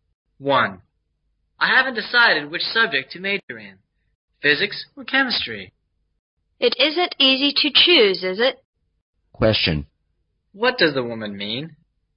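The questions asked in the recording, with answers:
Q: What does the woman mean?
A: Choosing between physics and chemistry is hard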